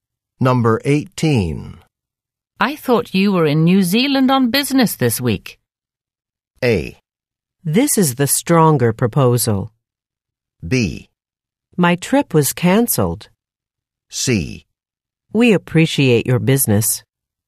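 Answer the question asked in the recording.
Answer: B: My trip was cancelled.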